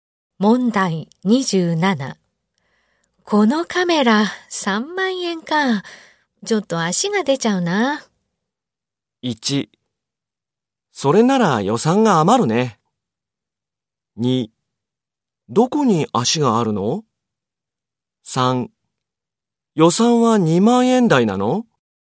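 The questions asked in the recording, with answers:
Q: このカメラ3万円か。ちょっと足が出ちゃうな。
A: 3: 予算は2万円台なの?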